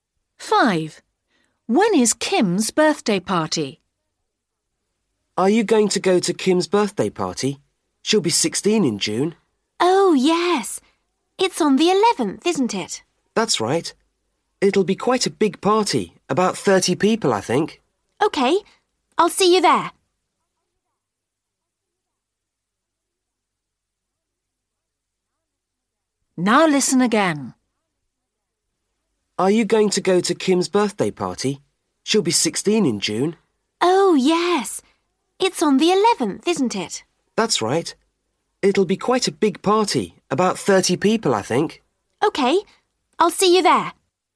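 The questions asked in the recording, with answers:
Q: When is Kim's birthday party?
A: 11th June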